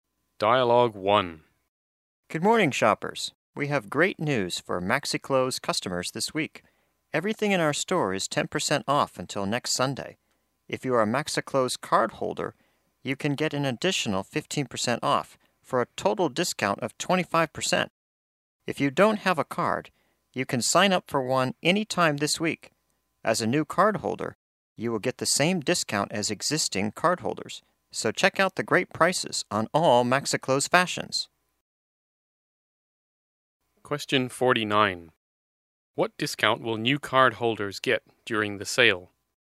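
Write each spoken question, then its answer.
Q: What discount will new cardholders get during the sale?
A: 25%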